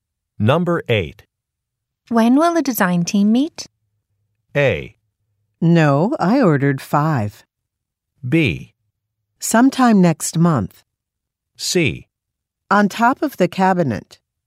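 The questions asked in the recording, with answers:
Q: When will the design team meet?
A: B: Sometime next month.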